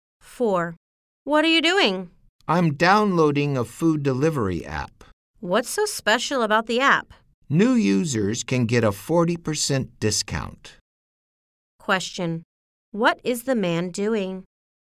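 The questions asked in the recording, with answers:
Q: What is the man doing?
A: Downloading a food delivery app.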